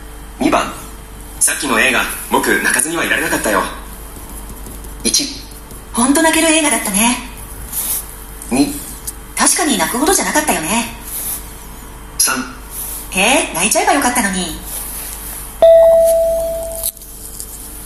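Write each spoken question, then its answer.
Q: さっきの映画僕泣かずにはいられなかったよ。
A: 1: 本当泣ける映画だったね。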